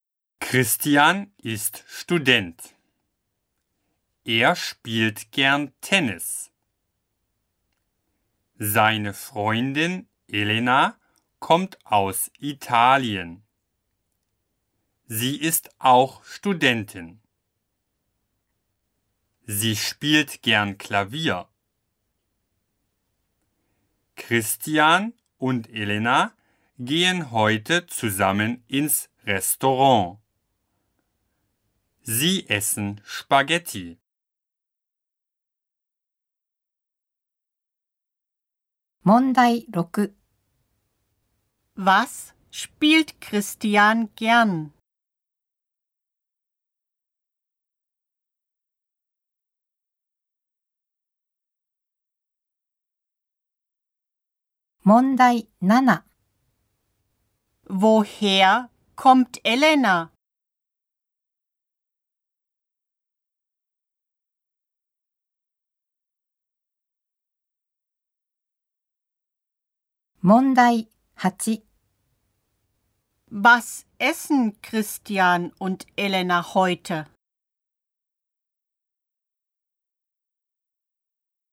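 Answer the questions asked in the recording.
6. Tennis
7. Aus Italien
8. Spaghetti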